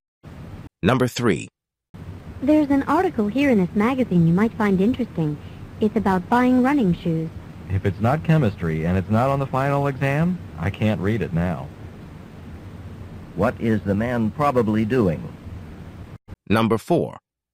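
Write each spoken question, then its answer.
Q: What is the man probably doing?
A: Studying for his chemistry final exam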